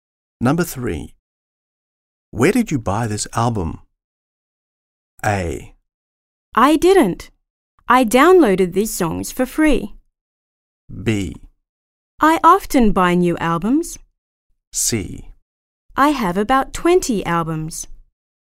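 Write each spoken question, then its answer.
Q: Where did you buy this album?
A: A: I didn't. I downloaded these songs for free.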